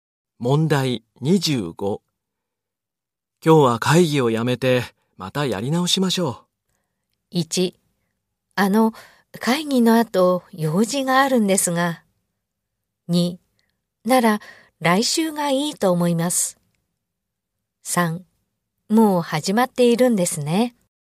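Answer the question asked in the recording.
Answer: 2: なら来週がいいと思います。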